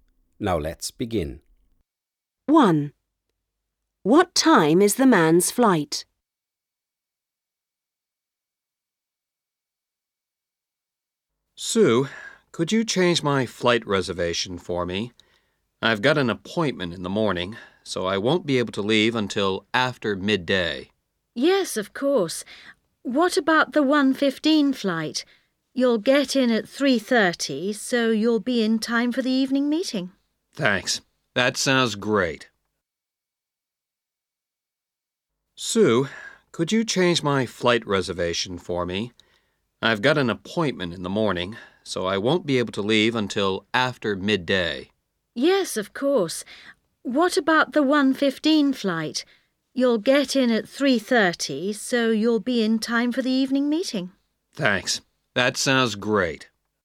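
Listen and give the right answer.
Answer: 1:15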